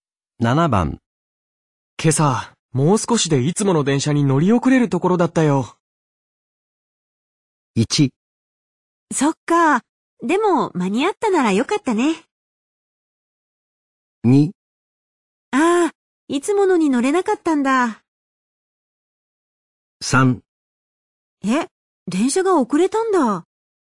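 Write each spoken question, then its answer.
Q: 今朝、もう少しでいつもの電車に乗り遅れるところだったよ。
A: 1: そっか。でも、間に合ったならよかったね。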